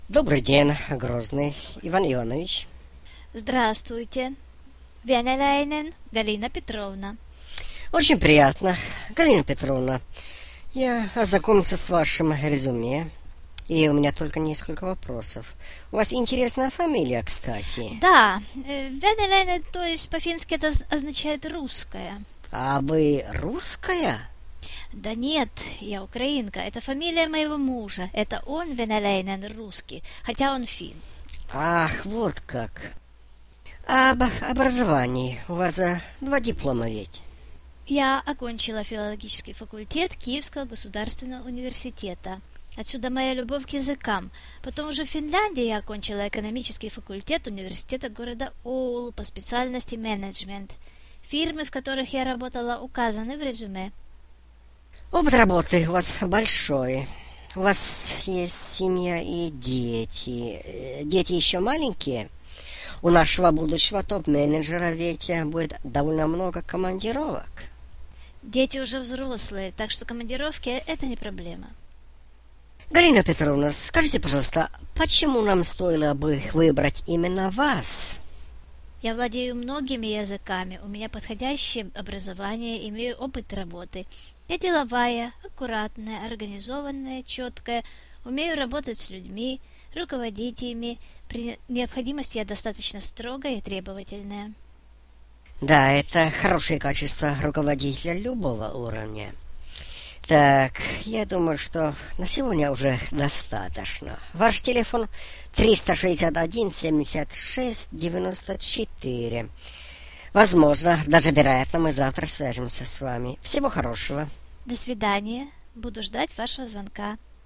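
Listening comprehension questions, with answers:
4. Интервью с третьим кандидатом.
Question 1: Её национальность :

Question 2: Образование:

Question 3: Семья:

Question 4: Почему Галина считает, что она должна стать топ-менеджером?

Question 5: Номер телефона:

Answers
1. украинка
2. филологический факультет Киевского университета; экономический факультет университета Оулу (менеджмент)
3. муж-финн, взрослые дети
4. владеет многими языками, подходящее образование, опыт работы, умеет руководить людьми
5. 361-76-94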